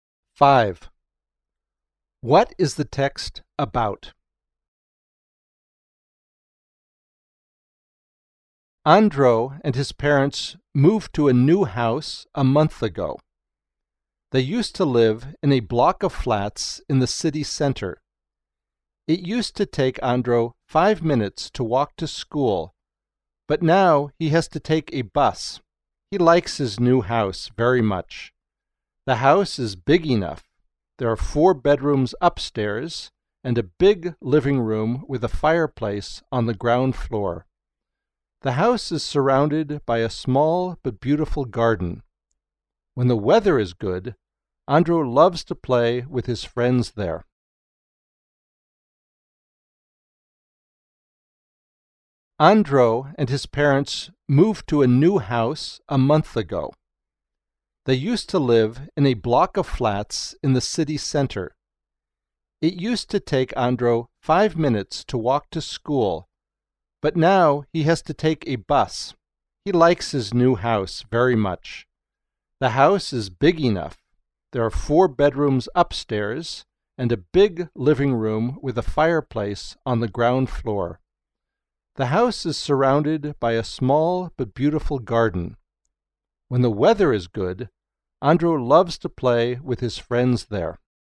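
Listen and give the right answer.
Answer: Andro's new house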